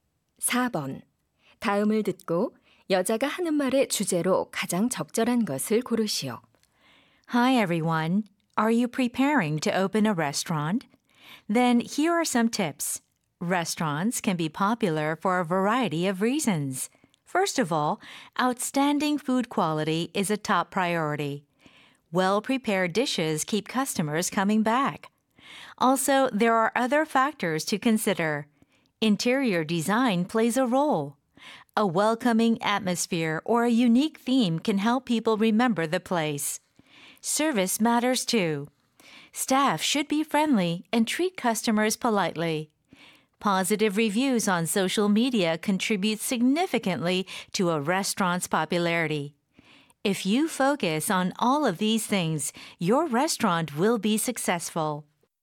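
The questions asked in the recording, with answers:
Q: 다음을 듣고 여자가 하는 말의 주제로 가장 적절한 것을 고르시오.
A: 식당이 인기를 얻는 요인들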